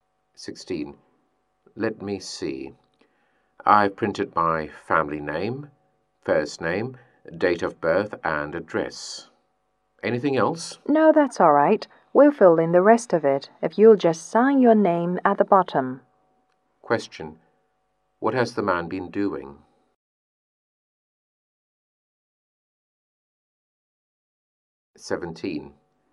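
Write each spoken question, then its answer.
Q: What has the man been doing?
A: Filling in a form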